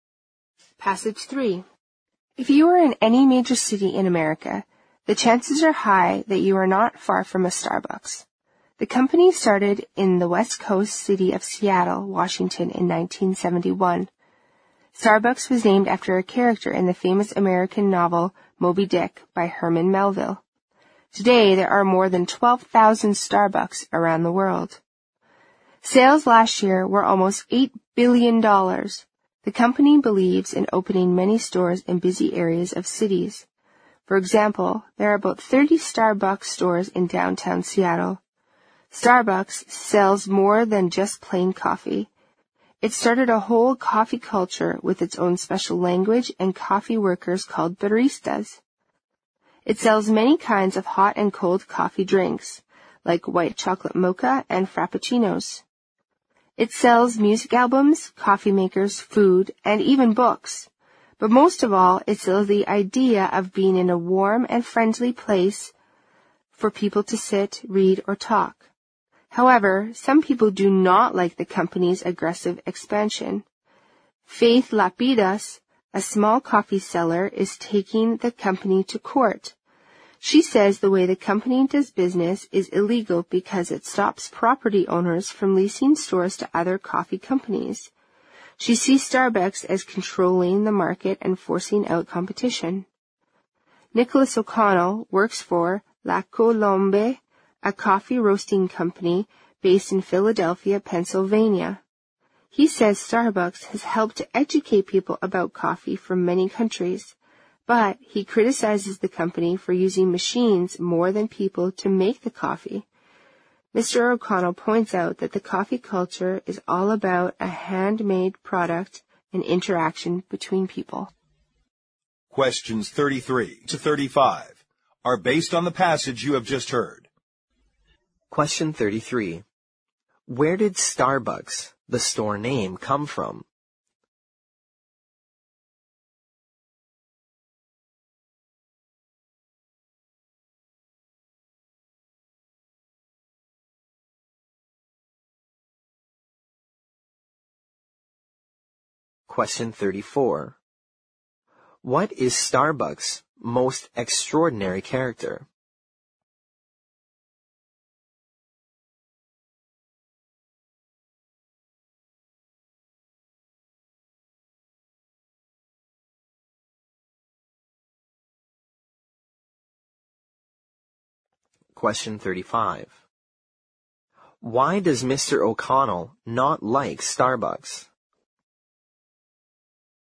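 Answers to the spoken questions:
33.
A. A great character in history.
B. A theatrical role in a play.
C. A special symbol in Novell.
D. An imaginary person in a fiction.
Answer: D. An imaginary person in a fiction.
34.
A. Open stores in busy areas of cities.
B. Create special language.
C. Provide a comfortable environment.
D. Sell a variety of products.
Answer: C. Provide a comfortable environment.
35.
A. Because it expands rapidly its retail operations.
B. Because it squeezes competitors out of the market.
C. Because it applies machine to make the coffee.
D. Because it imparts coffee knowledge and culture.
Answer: C. Because it applies machine to make the coffee.

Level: 六级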